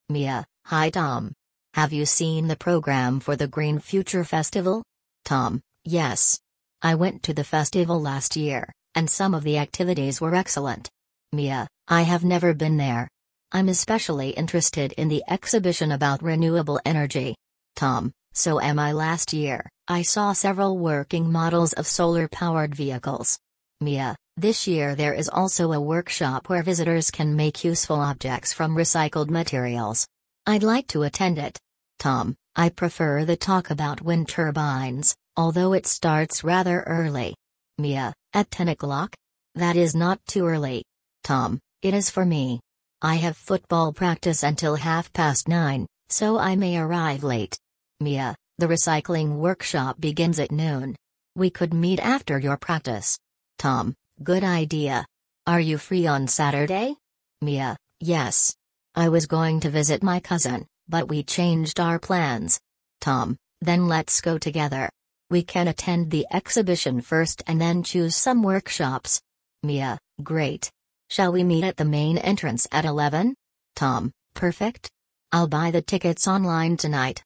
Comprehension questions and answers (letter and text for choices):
Вы услышите диалог. Для каждого вопроса A–E выберите один правильный вариант ответа из трёх предложенных: 1, 2 или 3. Вы услышите запись дважды.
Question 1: Who has attended the Green Future Festival before?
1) Mia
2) Tom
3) Neither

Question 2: Who is interested in renewable energy?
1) Mia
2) Tom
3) Both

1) Mia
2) Tom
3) Neither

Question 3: Who wants to attend the recycling workshop?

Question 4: Who is worried about the time of one activity?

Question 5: Who is planning to go to the festival on Saturday?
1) Mia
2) Tom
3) Both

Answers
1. 2) Tom
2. 3) Both
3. 1) Mia
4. 2) Tom
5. 3) Both

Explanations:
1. Только Том раньше посещал фестиваль: он был там в прошлом году.
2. Миа заинтересована в выставке о возобновляемой энергии, а Том говорит, что эта тема интересна и ему.
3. Миа хочет посетить мастер-класс, на котором из переработанных материалов делают полезные предметы.
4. Том беспокоится, что не успеет на раннюю лекцию после футбольной тренировки.
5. Миа и Том договариваются вместе пойти на фестиваль в субботу.

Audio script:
Mia: Hi Tom! Have you seen the programme for the Green Future Festival?
Tom: Yes. I went to the festival last year, and some of the activities were excellent.
Mia: I have never been there. I'm especially interested in the exhibition about renewable energy.
Tom: So am I. Last year, I saw several working models of solar-powered vehicles.
Mia: This year there is also a workshop where visitors can make useful objects from recycled materials. I'd like to attend it.
Tom: I prefer the talk about wind turbines, although it starts rather early.
Mia: At ten o'clock? That is not too early.
Tom: It is for me. I have football practice until half past nine, so I may arrive late.
Mia: The recycling workshop begins at noon. We could meet after your practice.
Tom: Good idea. Are you free on Saturday?
Mia: Yes. I was going to visit my cousin, but we changed our plans.
Tom: Then let's go together. We can attend the exhibition first and then choose some workshops.
Mia: Great. Shall we meet at the main entrance at eleven?
Tom: Perfect. I'll buy the tickets online tonight.

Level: 10 класса